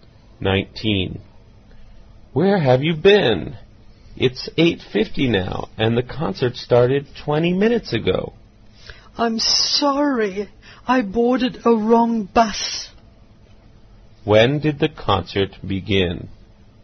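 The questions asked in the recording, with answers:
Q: When did the concert begin?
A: At 8:30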